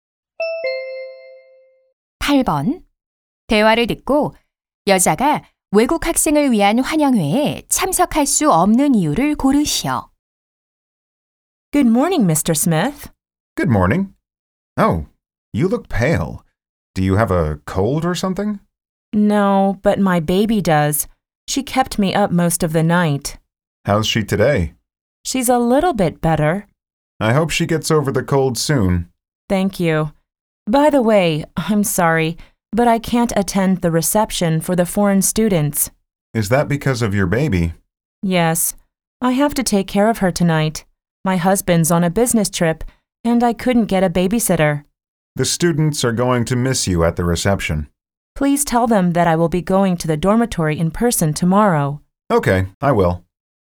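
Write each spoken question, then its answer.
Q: 대화를 듣고 여자가 외국 학생을 위한 환영회에 참석할 수 없는 이유를 고르시오.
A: 아픈 아기를 돌봐야 해서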